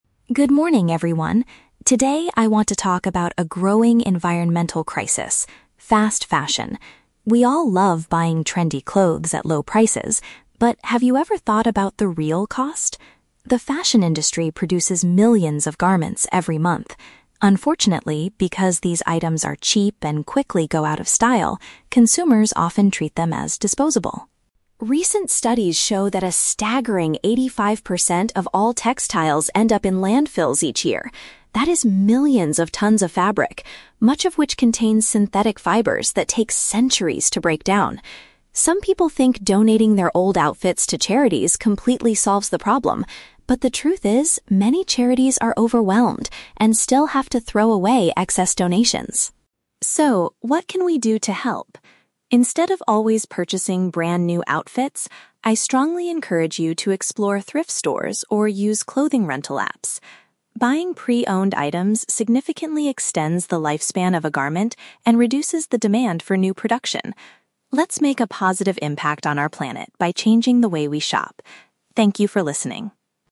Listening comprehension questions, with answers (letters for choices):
Listen to a presentation given by an environmental studies student, then choose the correct answer (A, B, or C) for each question.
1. What happens to the vast majority of clothing produced today?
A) It is successfully sold by charity organizations.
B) It is thrown away into garbage dumps.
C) It is recycled to create new synthetic materials.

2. Why does the speaker believe giving clothes to charity is not a perfect solution?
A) Because these groups receive more items than they can handle.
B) Because the materials take hundreds of years to break down.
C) Because charities usually sell the outfits at very high prices.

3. What is the speaker's main recommendation to the audience?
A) To only buy clothes made from natural, eco-friendly materials.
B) To donate all their old outfits to the local thrift store.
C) To purchase second-hand clothing instead of brand new ones.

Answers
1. B
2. A
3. C

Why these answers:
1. The speaker says that "eighty-five percent of all textiles end up in landfills each year." Option (B) uses paraphrasing ("vast majority" for 85%, "thrown away into garbage dumps" for "end up in landfills"). Option (A) is a trap; the speaker mentions charities, but says they actually have to throw away excess donations. Option (C) is a plausible eco-friendly solution but is never mentioned in the audio.
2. The speaker explains that "many charities are overwhelmed and still have to throw away excess donations." Option (A) is a paraphrase of being "overwhelmed" with "excess" items. Option (B) is a trap; it is true that synthetic fibers take centuries to break down, but this is a fact about the fabric in landfills, not the reason why charities struggle. Option (C) is not mentioned.
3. The speaker strongly encourages the audience to "explore thrift stores... Buying pre-owned items significantly extends the lifespan of a garment." Option (C) uses the synonym "second-hand clothing" for "pre-owned items / from thrift stores." Option (A) is a trap; the speaker mentions "synthetic fibers" earlier, but does not tell the audience to buy natural materials. Option (B) is a trap; the speaker wants people to buy from thrift stores, not just donate to them (as donating was already proven to be an imperfect solution).

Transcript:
Student: Good morning, everyone. Today, I want to talk about a growing environmental crisis: fast fashion. We all love buying trendy clothes at low prices, but have you ever thought about the real cost? The fashion industry produces millions of garments every month. Unfortunately, because these items are cheap and quickly go out of style, consumers often treat them as disposable.
Recent studies show that a staggering eighty-five percent of all textiles end up in landfills each year. That is millions of tons of fabric, much of which contains synthetic fibers that take centuries to break down. Some people think donating their old outfits to charities completely solves the problem, but the truth is, many charities are overwhelmed and still have to throw away excess donations.
So, what can we do to help? Instead of always purchasing brand new outfits, I strongly encourage you to explore thrift stores or use clothing rental apps. Buying pre-owned items significantly extends the lifespan of a garment and reduces the demand for new production. Let's make a positive impact on our planet by changing the way we shop. Thank you for listening.